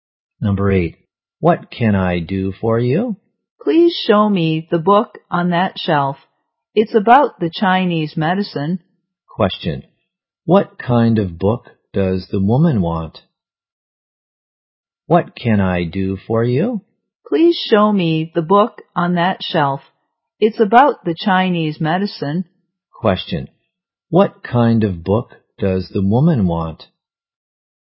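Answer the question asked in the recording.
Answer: A book about Chinese medicine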